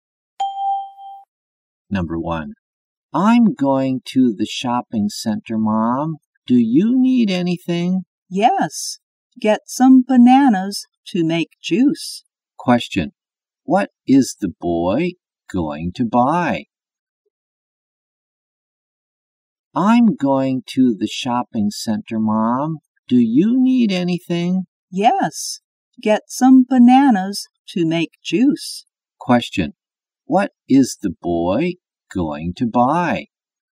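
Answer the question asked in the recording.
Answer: Some bananas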